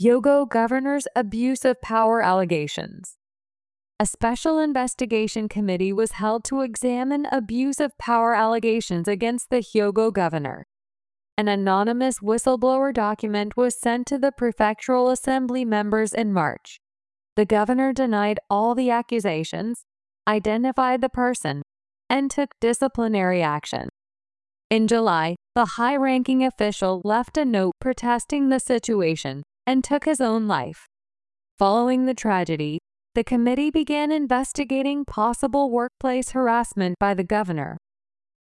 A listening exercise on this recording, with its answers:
英語ニュースの音声を聞き、各空欄に入る英文を正確に書き取ってください。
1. ( ) to the prefectural assembly members in March.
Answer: An anonymous whistleblower document was sent

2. ( ) identified the person, and took disciplinary action.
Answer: The governor denied all the accusations

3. In July, the high-ranking official left a note ( ).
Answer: protesting the situation and took his own life

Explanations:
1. 所有格を使う表現も文法的には合っています。が、この音声では語尾の[z]が発音されていません。 whistleblower」は「内部告発の」という意味になり、名詞が形容詞的な働きをしています。 whistleblowers」という所有格にならないと文法的におかしい、と考えた人は、「前の名詞が形容詞として後ろの名詞を修飾する用法」を覚えておきましょう。
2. 「all(すべての)」は必ず複数のものを指します。このため、後に続く名詞は「accusations」のように複数形になります。
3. 「protest(抗議する)」と「protect(保護する)」は意味も発音も違います。 子音の[s][k]をしっかり聞き分けましょう。

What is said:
Hyogo Governor's Abuse of Power Allegations
A special investigation committee was held to examine abuse of power allegations against the Hyogo governor.
An anonymous whistleblower document was sent to the prefectural assembly members in March.
The governor denied all the accusations, identified the person, and took disciplinary action.
In July, the high-ranking official left a note protesting the situation and took his own life.
Following the tragedy, the committee began investigating possible workplace harassment by the governor.